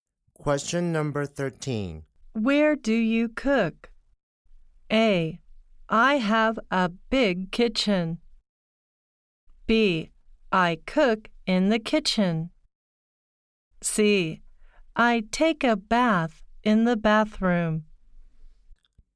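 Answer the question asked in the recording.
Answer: B: I cook in the kitchen.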